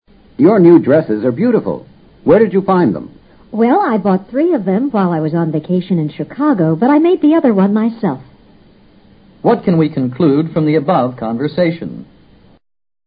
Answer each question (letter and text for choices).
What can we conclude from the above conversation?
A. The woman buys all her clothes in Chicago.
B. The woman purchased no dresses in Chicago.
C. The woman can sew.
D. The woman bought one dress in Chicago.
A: C. The woman can sew.

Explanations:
答案是根据I made the other one myself提供的信息做出的推断。sew: 缝制。 A,B,D均与对话中包含的信息不符或相悖。